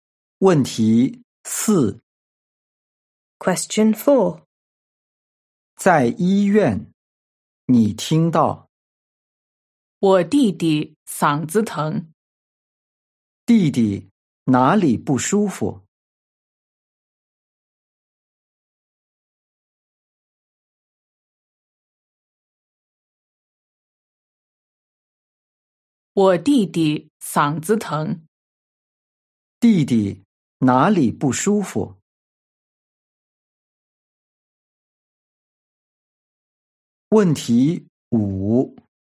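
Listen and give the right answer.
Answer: 嗓子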